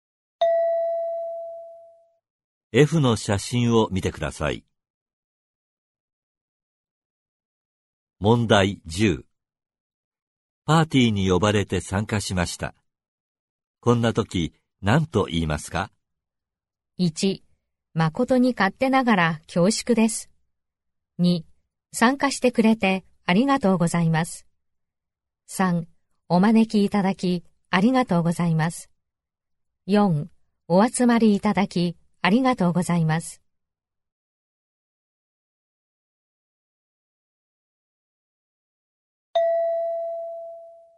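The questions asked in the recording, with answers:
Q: パーティーに呼ばれて参加しました。こんな時、何と言いますか?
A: 3: お招きいただきありがとうございます。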